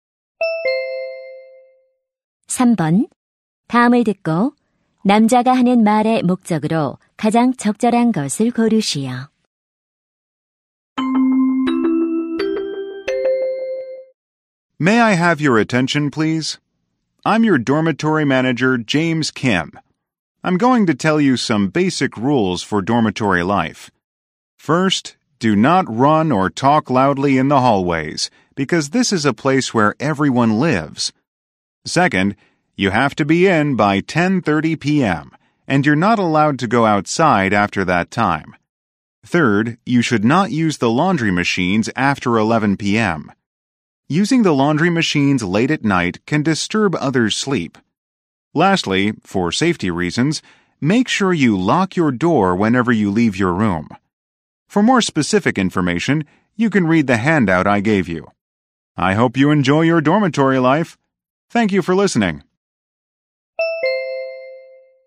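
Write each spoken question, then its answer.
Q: 다음을 듣고 남자가 하는 말의 목적으로 가장 적절한 것을 고르시오.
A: 기숙사 생활 규칙을 안내하려고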